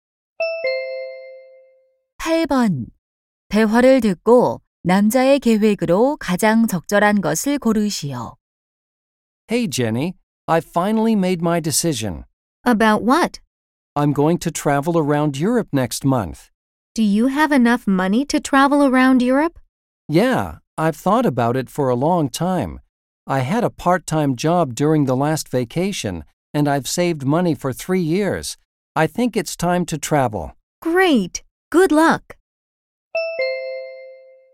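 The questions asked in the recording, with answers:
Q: 대화를 듣고 남자의 계획으로 가장 적절한 것을 고르시오.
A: 다음 달 유럽 여행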